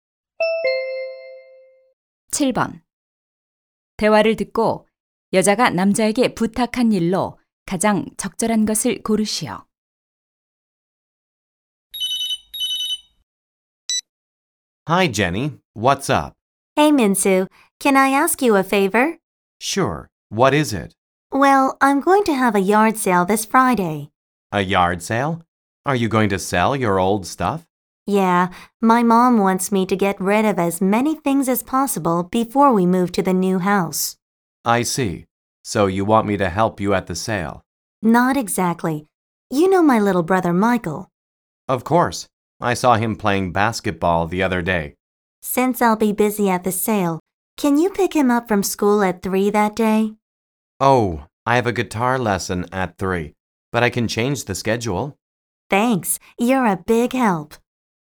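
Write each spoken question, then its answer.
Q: 대화를 듣고 여자가 남자에게 부탁한 일로 가장 적절한 것을 고르시오.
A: 남동생을 학교에서 데려오기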